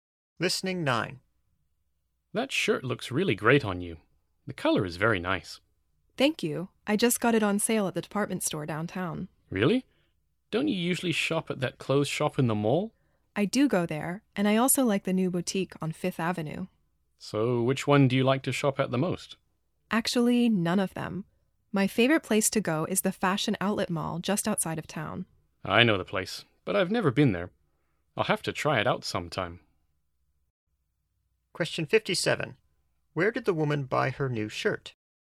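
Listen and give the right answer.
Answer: At the department store downtown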